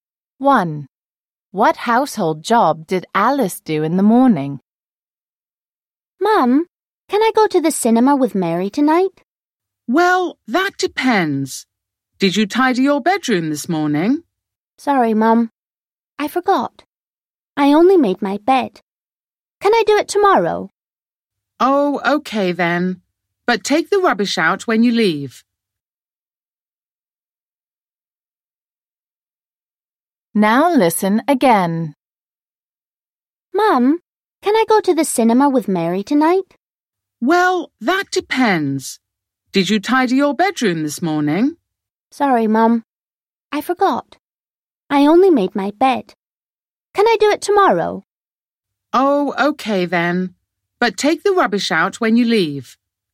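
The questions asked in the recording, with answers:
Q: What household job did Alice do in the morning?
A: She made her bed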